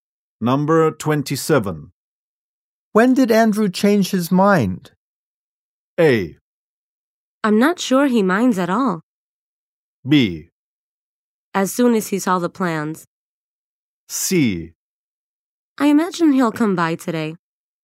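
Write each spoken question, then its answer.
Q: When did Andrew change his mind?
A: B: As soon as he saw the plans.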